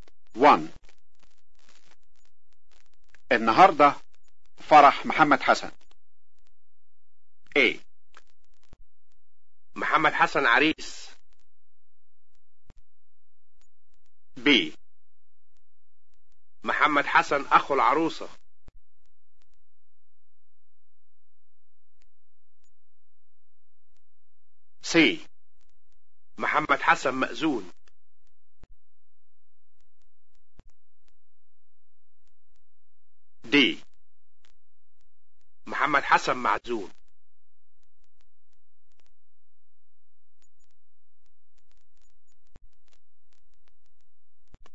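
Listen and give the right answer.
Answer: A: محمد حسن عريس.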